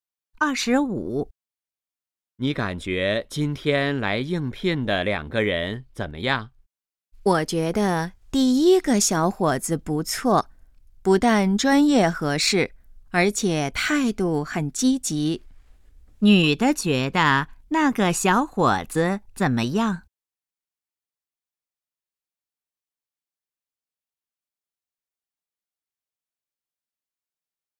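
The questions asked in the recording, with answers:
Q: 女的觉得那个小伙子怎么样?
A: 不错,专业合适,态度积极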